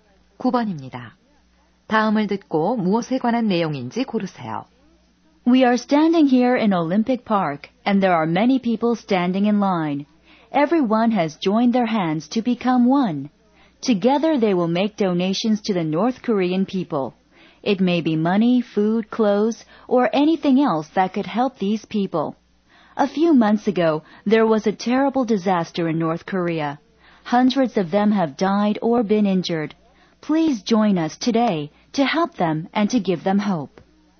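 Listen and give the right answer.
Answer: 재난을 당한 북한 주민을 위한 모금 활동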